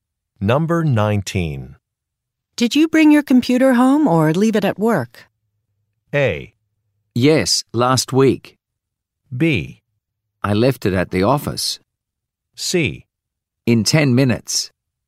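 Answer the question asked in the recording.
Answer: B: I left it at the office.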